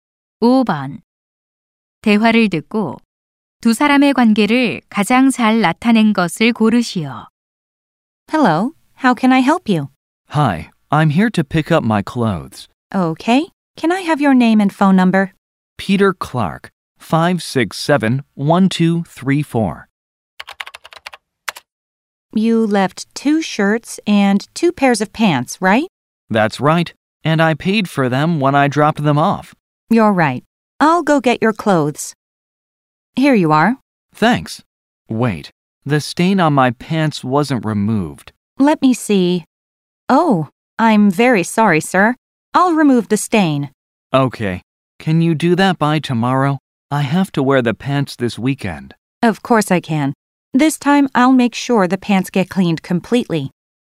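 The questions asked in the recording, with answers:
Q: 대화를 듣고 두 사람의 관계를 가장 잘 나타낸 것을 고르시오.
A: 세탁소 직원과 손님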